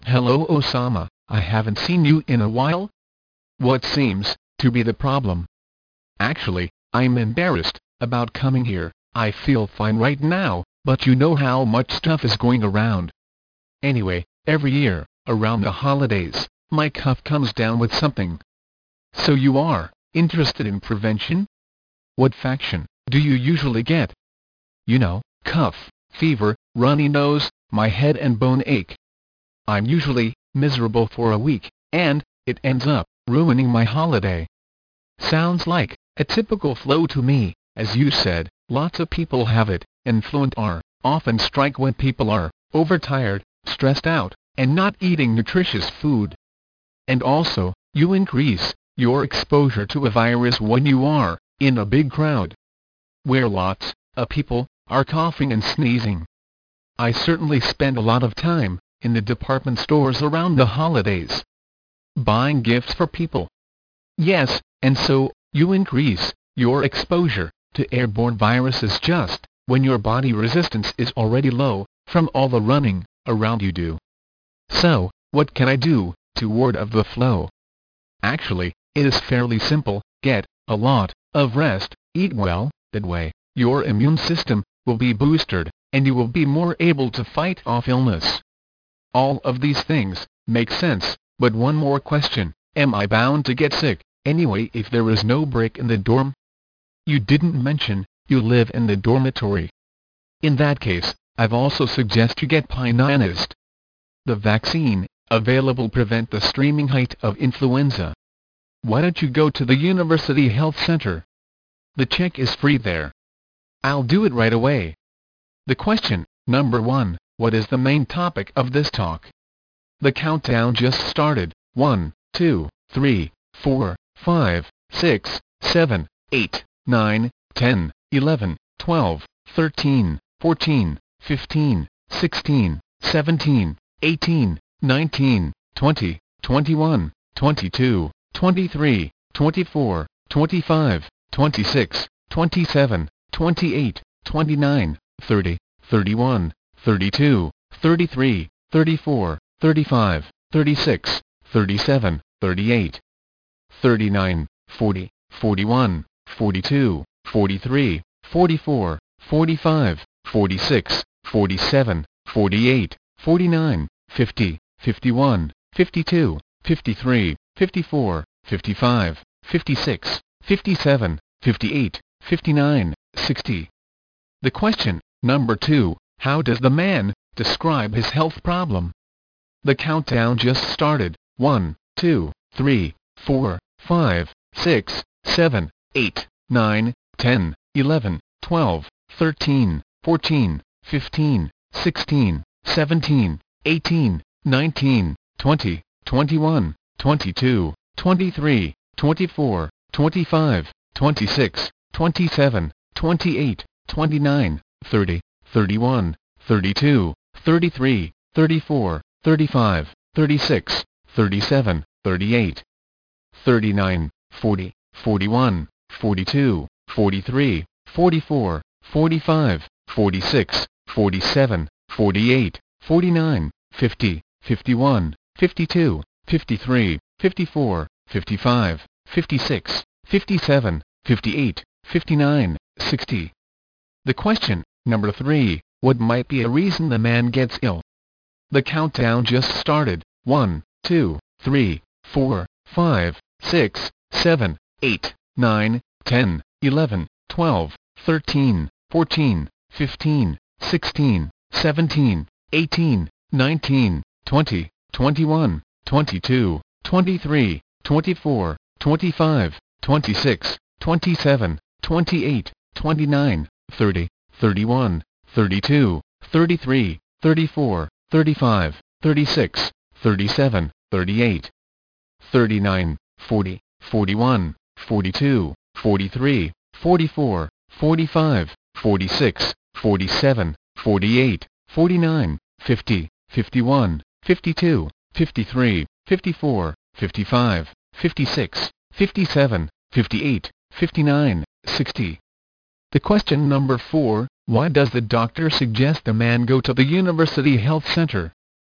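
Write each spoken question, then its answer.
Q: what is the main topic of this talk?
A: How to prevent getting the flu during the holidays

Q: how does the man describe his health problem?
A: Every year around the holidays he gets sick with a cough, fever, runny nose and aches, and feels miserable for a week

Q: what might be a reason the man gets ill?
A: He is overtired and stressed, and he spends time in crowded department stores where he is exposed to viruses

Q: why does the doctor suggest a man go to the University Health Center?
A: To get a flu vaccine, which is free there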